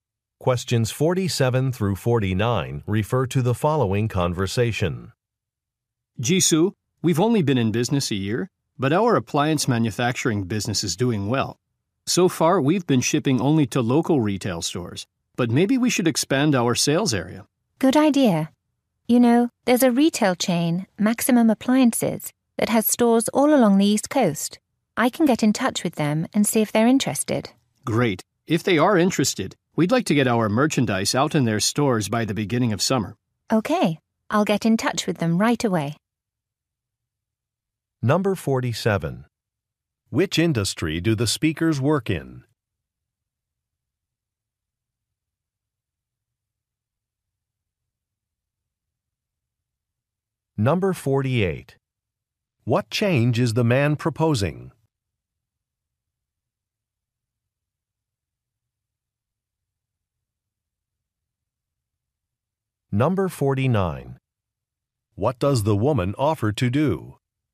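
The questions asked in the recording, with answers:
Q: Which industry do the speakers work in?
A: Appliance manufacturing

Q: What change is the man proposing?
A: Expanding their sales area

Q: What does the woman offer to do?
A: Contact a retail chain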